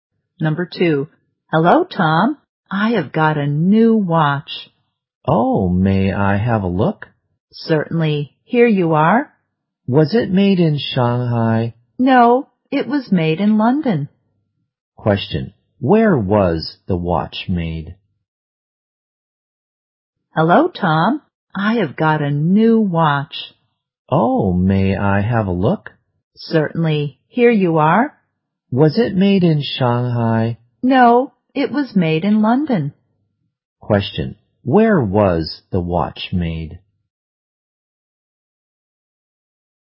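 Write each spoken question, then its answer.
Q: Where was the watch made?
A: In London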